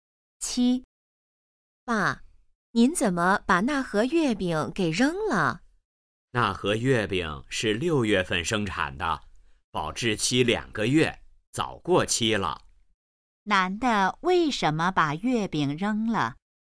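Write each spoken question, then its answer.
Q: 男的为什么把月饼扔了?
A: 月饼过期了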